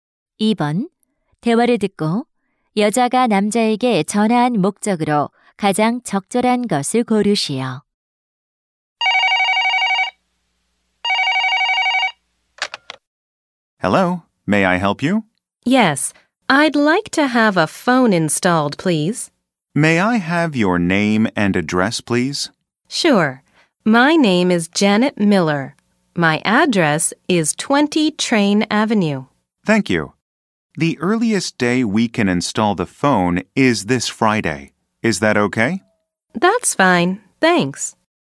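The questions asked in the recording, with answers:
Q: 대화를 듣고 여자가 남자에게 전화한 목적으로 가장 적절한 것을 고르시오.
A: 전화 설치를 신청하려고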